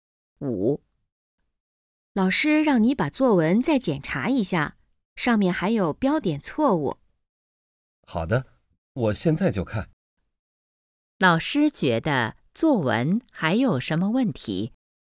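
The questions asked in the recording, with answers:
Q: 老师觉得作文还有什么问题?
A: 有标点错误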